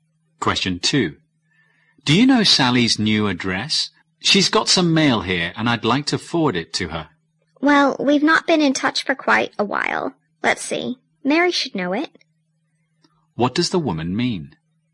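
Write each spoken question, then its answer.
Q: What does the woman mean?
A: She doesn't know Sally's address; Mary may know it.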